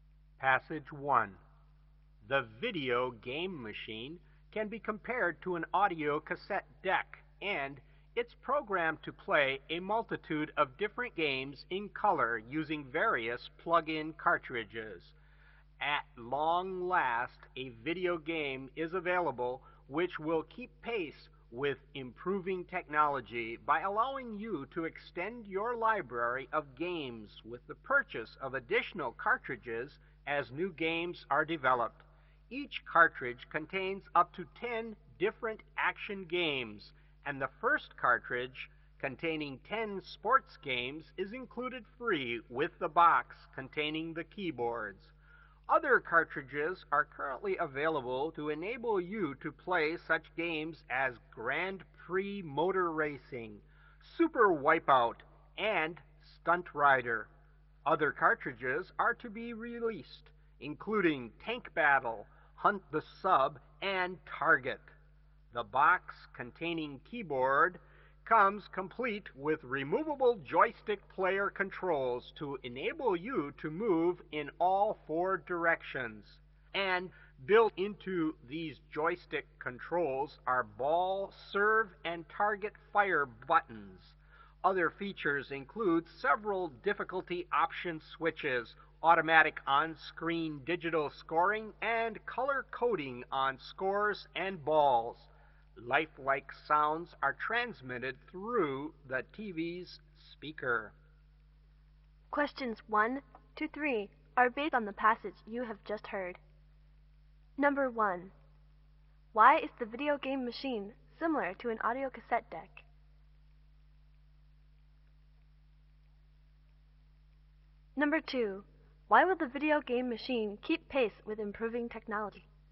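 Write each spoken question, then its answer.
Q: Why is the video game machine similar to an audio cassette deck?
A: It can play many different games using plug-in cartridges

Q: Why will the video game machine keep pace with improving technology?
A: You can extend your library by buying new cartridges as new games are developed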